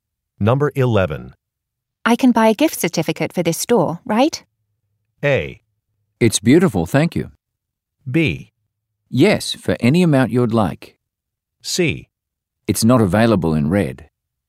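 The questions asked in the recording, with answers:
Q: I can buy a gift certificate for this store, right?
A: B: Yes, for any amount you'd like.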